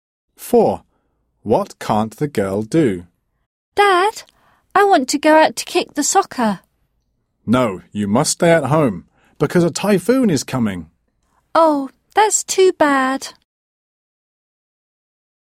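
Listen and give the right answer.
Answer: Go out to play soccer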